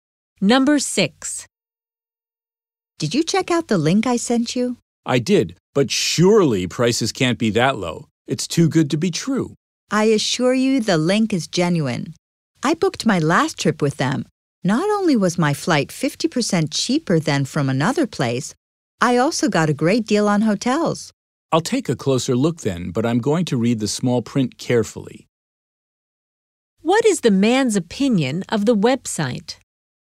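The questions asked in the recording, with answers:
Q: What is the man's opinion of the website?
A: It is genuine and offers great deals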